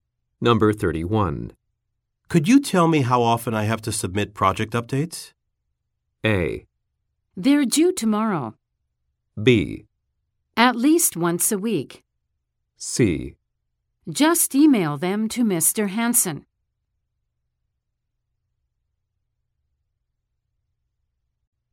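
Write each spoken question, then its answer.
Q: Could you tell me how often I have to submit project updates?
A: B: At least once a week.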